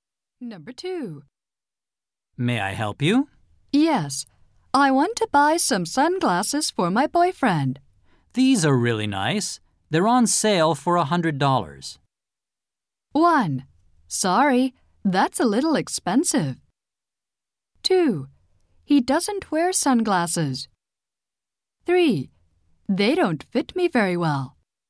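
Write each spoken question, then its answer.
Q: These are really nice.They're on sale for $100.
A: 1: Sorry, that's a little expensive.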